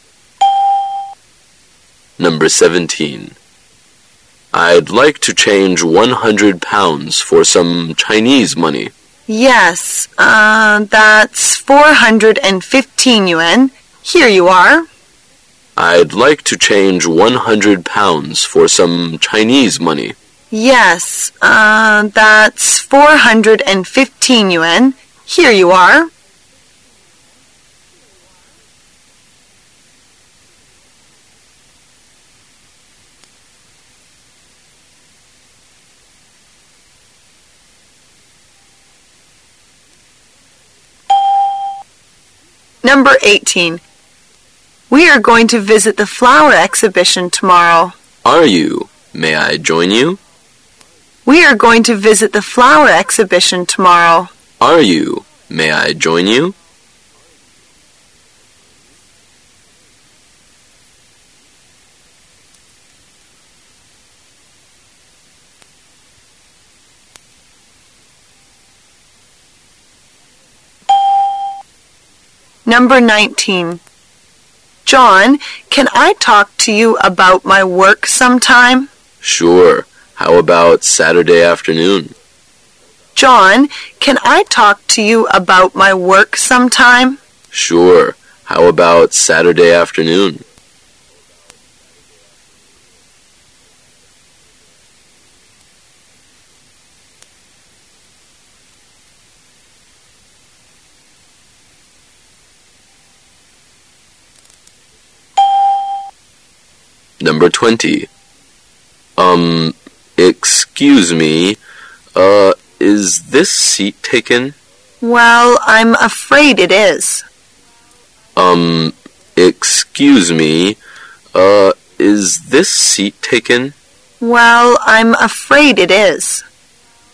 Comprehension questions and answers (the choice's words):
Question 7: Where are they talking?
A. In a bank.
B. In a hotel.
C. In a post office.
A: In a bank.

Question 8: What does the man mean?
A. He is not interested in going.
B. He wants to go with them.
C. He will invite his friends.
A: He wants to go with them.

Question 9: What will happen?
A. John will be away.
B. The woman will go out.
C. They will have a meeting.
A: They will have a meeting.

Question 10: What will the man do next?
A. Say he was sorry to ask.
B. Try to find another seat.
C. Sit down and have a rest.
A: Try to find another seat.

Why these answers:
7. [解析] 根据对话内容,男:"I'd like to change 100 pounds for some Chinese money."可以推断出该对话只能发生在银行。故本题答案为A。 [听力原文] M: I'd like to change 100 pounds for some Chinese money. W: Yes. Er... that's415 yuan .., here you are.
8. [解析] 根据对话内容,男:"May I join you?"可以推断出他想和他们一起去。故本题答案为B。 [听力原文] W: We are going to visit the flower exhibition tomorrow. M: Are you? May I join you?
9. [解析] 由对话可知,他们将在星期六下午就这个女士的工作碰个面。故本题答案为C。 [听力原文] W: John, can I talk to you about my work some time? M: Sure. How about Saturday afternoon?
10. [解析] 根据对话内容,男:"这个座位是否被占了?"女:"它是被占了。"可以推断出男土将可能再找一个座位。故本题答案为B。 [听力原文] M: Um ... excuse me, er ... is this seat taken? W: Well, I'm afraid it is.